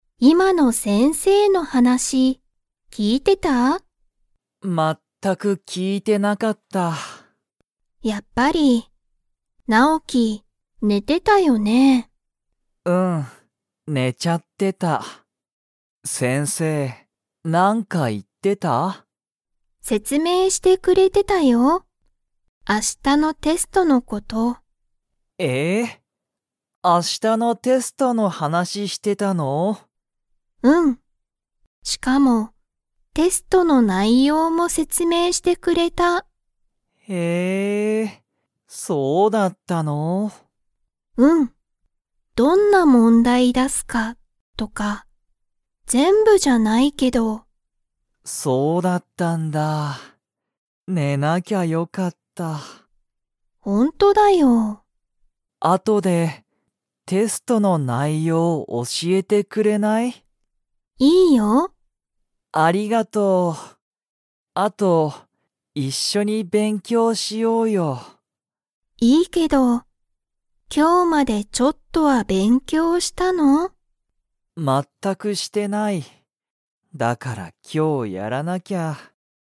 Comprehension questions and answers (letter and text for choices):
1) ナオキは、先生せんせいの話はなしを聞きいていましたか?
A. はい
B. いいえ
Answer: B. いいえ

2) 先生せんせいは、____を教おしえてくれた。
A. 今日きょうの話はなし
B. テストの内容ないよう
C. 昨日きのうの勉強べんきょう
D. いつもの問題もんだい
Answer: B. テストの内容ないよう

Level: Level 2